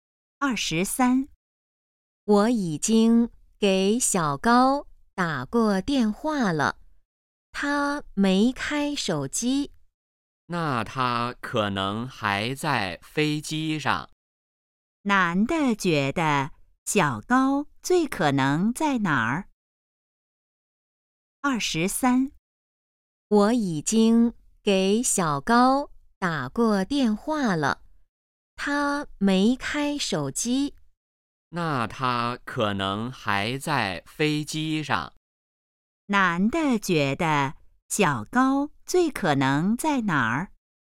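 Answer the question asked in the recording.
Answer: 飞机上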